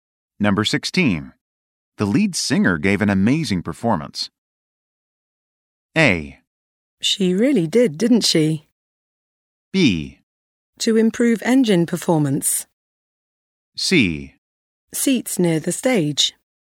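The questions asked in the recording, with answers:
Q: The lead singer gave an amazing performance.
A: A: She really did, didn't she?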